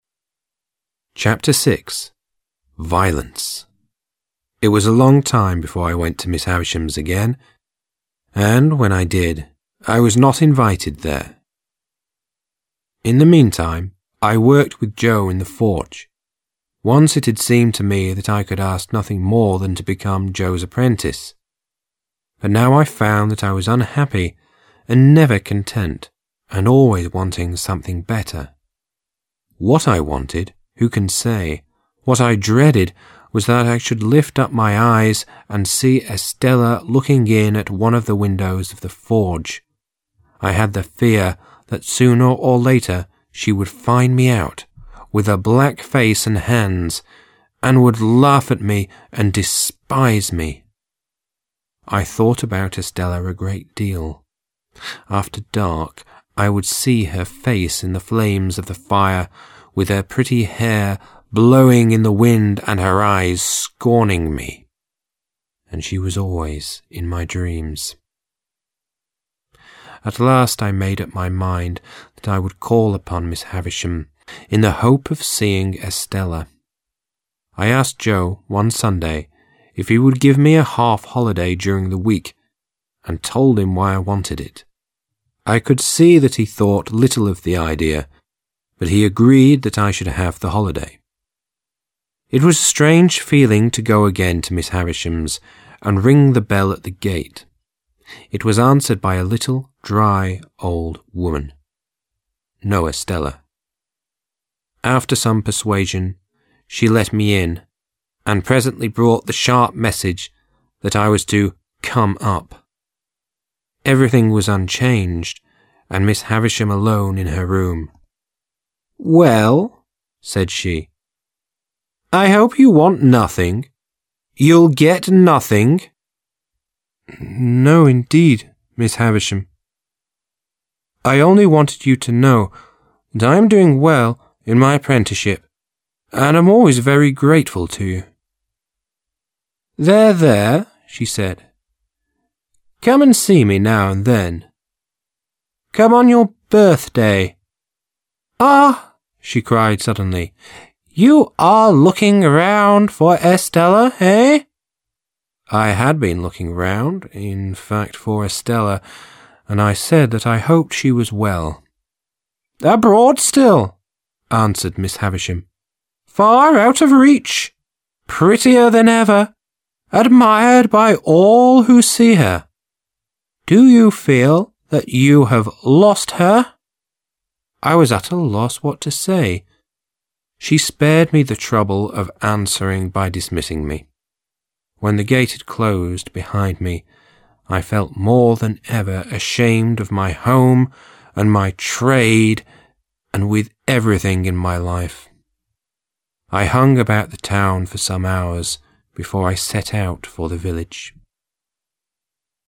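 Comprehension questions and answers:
Task 1. Listen to the recording 06_01 and put the given excerpts in the correct order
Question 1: I was at a loss what to say.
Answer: 14

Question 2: When the gate had closed behind me, I felt more than ever ashamed of my home and my trade and with everything in my life.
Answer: 16

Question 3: She spared me the trouble of answering by dismissing me.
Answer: 15

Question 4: "Abroad still," answered Miss Havisham. "Far out of reach; prettier than ever; admired by all who see her. Do you feel that you have lost her?"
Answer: 13

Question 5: "There, there!" she said. "Come and see me now and then; come on your birthday. —Ah!" she cried suddenly. "You are looking round for Estella? Hey?"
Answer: 11

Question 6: I had been looking round—in fact, for Estella—and I said that I hoped she was well.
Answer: 12

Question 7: "Well ?" said she. "I hope you want nothing. 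You'll get nothing!"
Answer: 9

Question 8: After some persuasion she let me in, and presently brought the sharp message that I was to "come up". Everything was unchanged, and Miss Havisham alone in her room.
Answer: 8

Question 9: It was a strange feeling to go again to Miss Havisham's and ring the bell at the gate. It was answered by a little, dry, old woman. No Estella.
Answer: 7

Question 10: "No, indeed, Miss Havisham. I only wanted you to know that I am doing well in my apprenticeship, and am always very grateful to you."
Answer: 10

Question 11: I had the fear that sooner or later she would find me out, with a black face and hands, and would laugh at me and despise me.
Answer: 4

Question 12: At last I made up my mind that I would call upon Miss Havisham in the hope of seeing Estella.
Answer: 6

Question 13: What I wanted, who can say? What I dreaded was that I should lift up my eyes and see Estella looking in at one of the windows of the forge.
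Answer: 3

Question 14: In the meantime, I worked with Joe in the forge.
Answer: 2

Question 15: I thought about Estella a great deal.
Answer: 5

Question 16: I hung about the town for some hours before I set out for the village.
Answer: 17

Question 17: It was a long time before I went to Miss Havisham's again, and, when I did, I was not invited there....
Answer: 1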